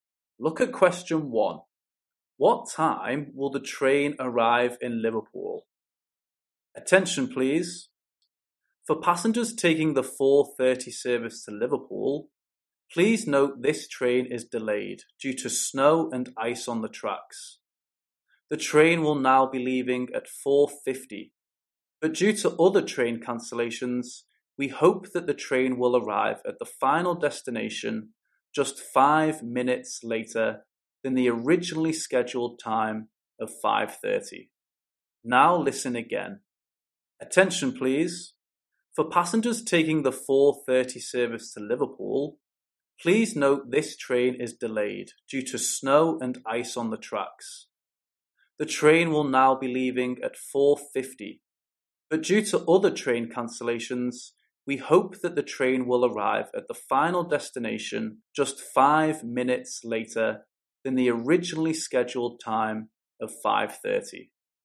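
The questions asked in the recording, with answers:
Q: What time will the train arrive in Liverpool?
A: 5:35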